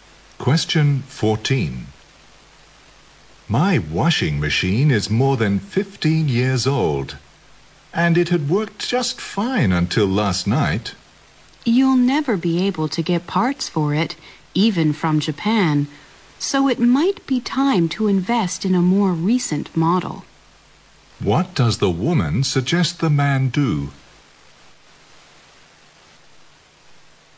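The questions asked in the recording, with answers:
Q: What does the woman suggest the man do?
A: Buy a new washing machine.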